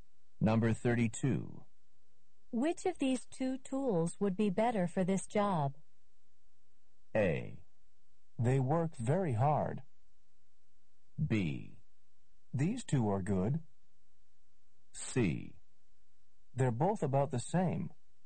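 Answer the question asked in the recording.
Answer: C: They're both about the same.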